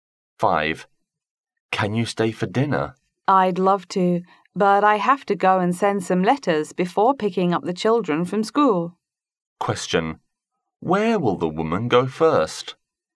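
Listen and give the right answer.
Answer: To the post office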